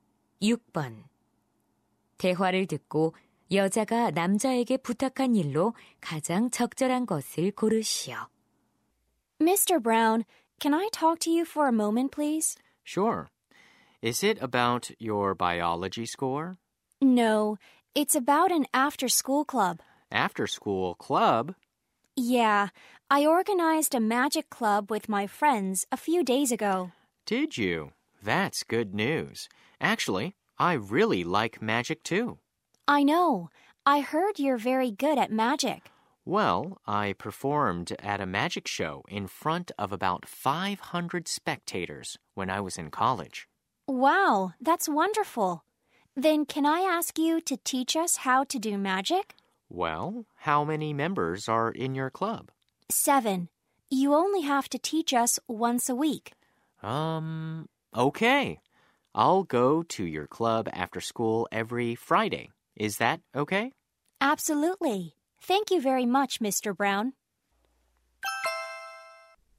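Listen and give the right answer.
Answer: 마술 동아리에서 마술 가르쳐 주기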